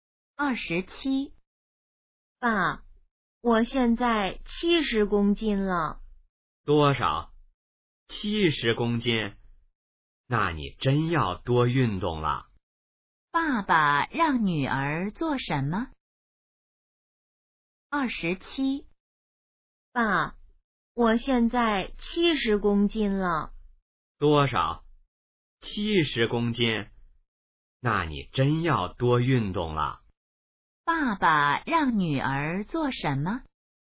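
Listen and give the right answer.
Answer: 多运动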